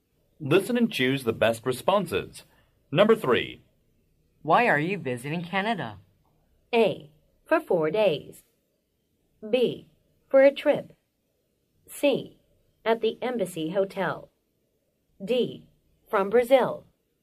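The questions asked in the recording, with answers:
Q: Why are you visiting Canada?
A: B: For a trip.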